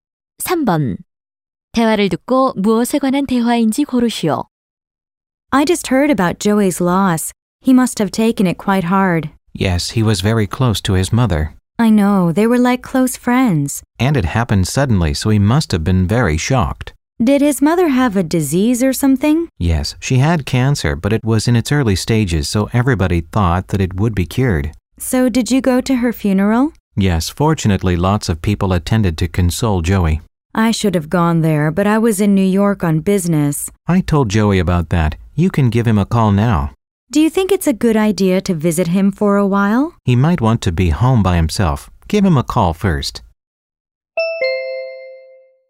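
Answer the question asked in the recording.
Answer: 조이 어머니의 죽음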